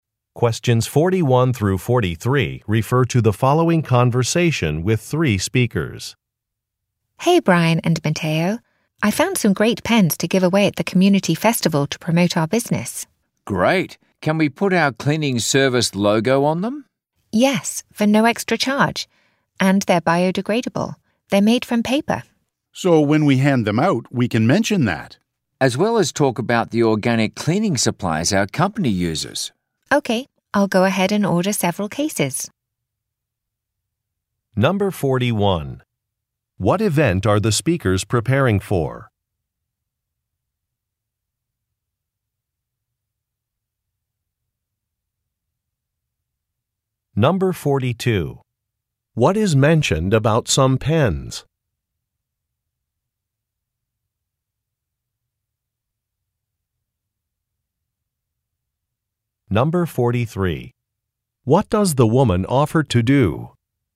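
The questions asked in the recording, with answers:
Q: What event are the speakers preparing for?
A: A community festival

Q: What is mentioned about some pens?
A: They are biodegradable (made from paper)

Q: What does the woman offer to do?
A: Order several cases of pens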